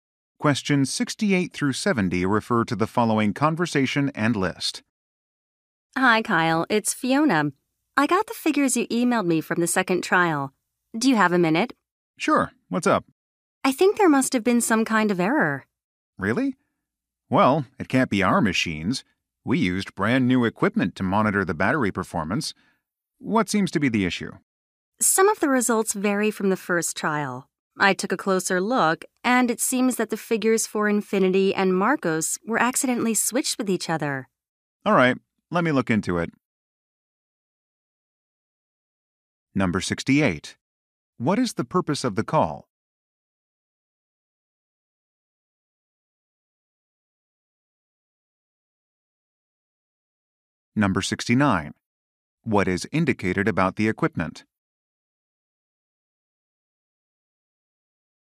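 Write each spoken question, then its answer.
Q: What is the purpose of the call?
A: To report an error in the trial figures

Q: What is indicated about the equipment?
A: It is brand new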